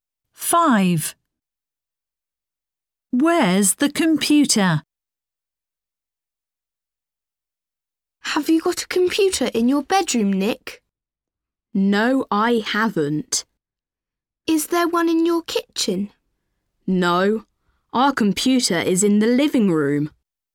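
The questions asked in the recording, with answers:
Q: Where's the computer?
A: In the living room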